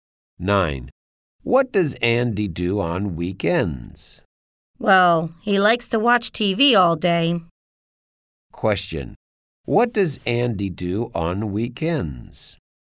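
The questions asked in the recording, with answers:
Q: Question. What does Andy do on weekends?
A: He watches TV all day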